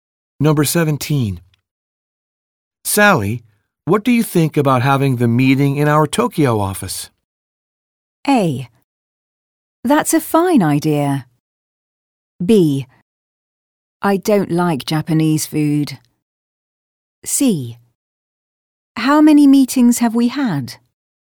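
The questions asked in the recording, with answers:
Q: Sally, what do you think about having the meeting in our Tokyo office?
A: A: That's a fine idea.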